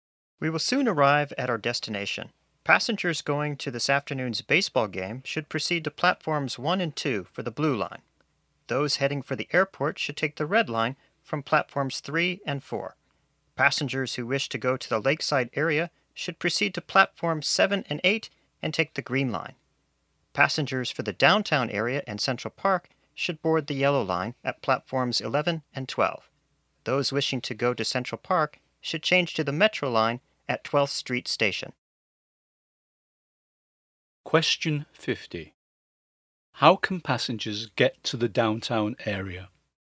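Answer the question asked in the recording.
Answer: Take the yellow line from platforms 11 and 12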